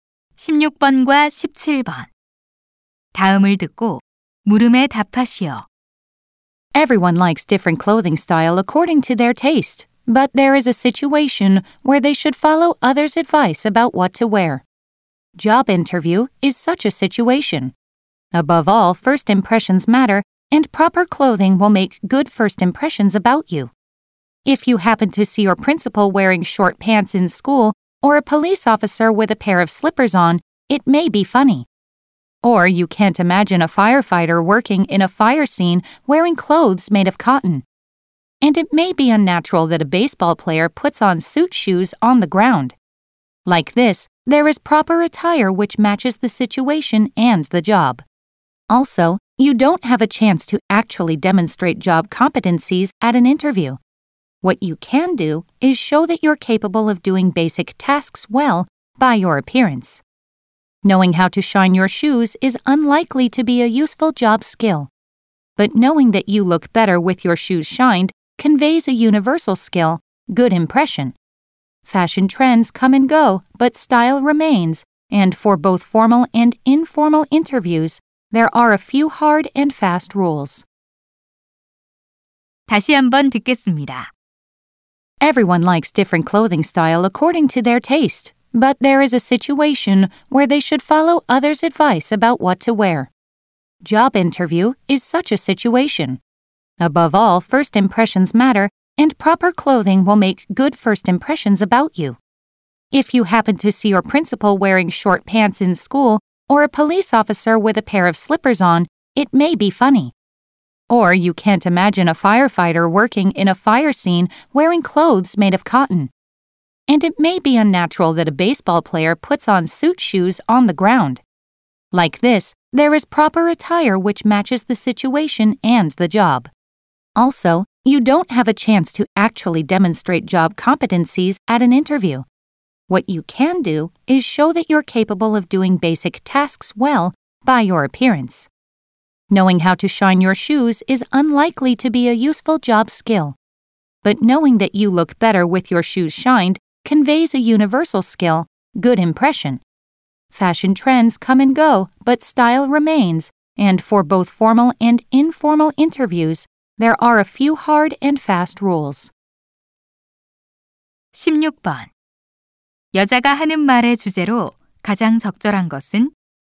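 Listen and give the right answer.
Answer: 면접에서 적절한 복장의 중요성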